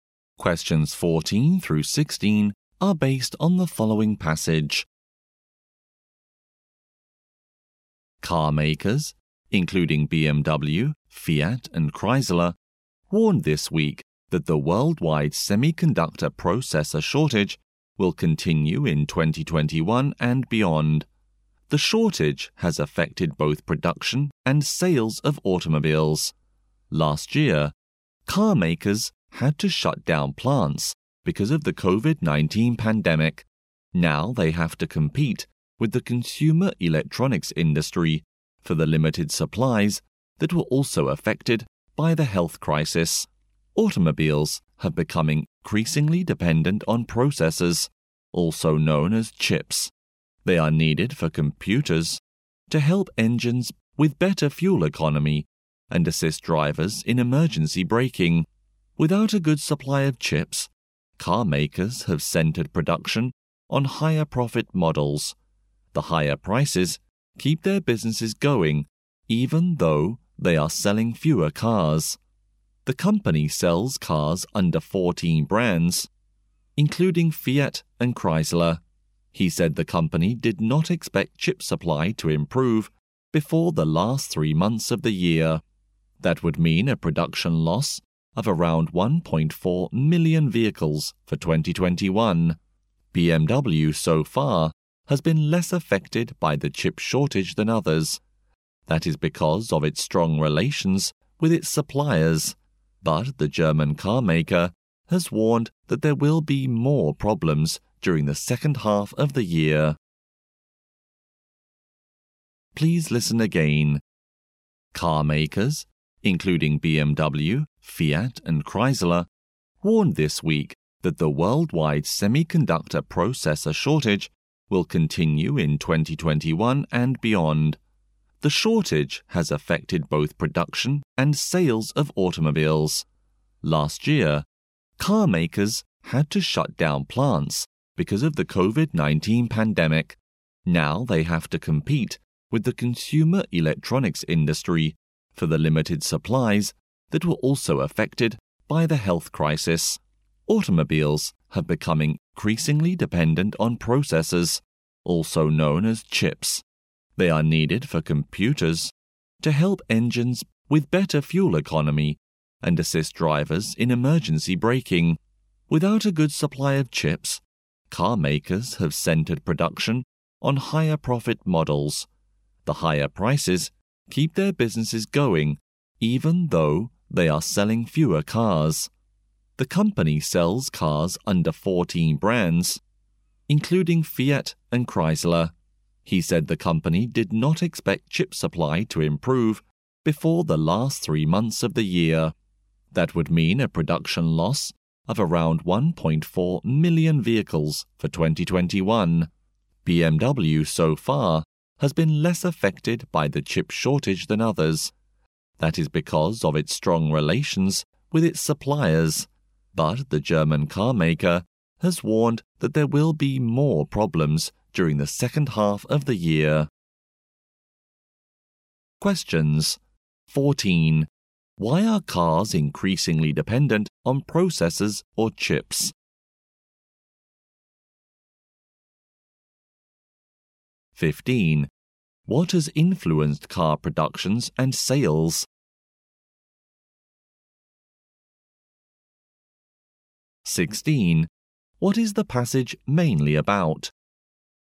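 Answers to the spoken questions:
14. Chips help engines get better fuel economy and help drivers with emergency braking
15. The shortage of chips
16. The worldwide chip shortage is hurting car makers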